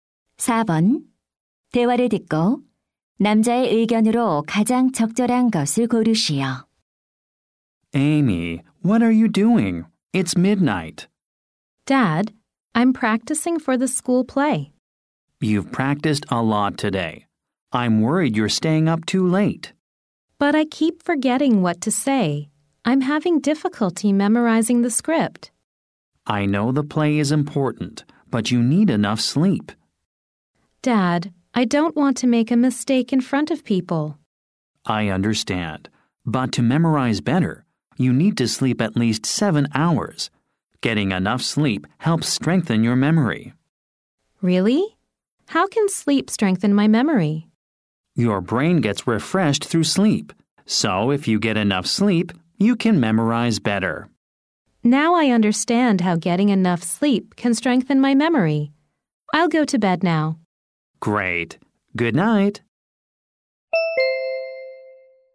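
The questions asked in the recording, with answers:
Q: 대화를 듣고 남자의 의견으로 가장 적절한 것을 고르시오.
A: 충분한 수면은 기억력 강화에 도움이 된다.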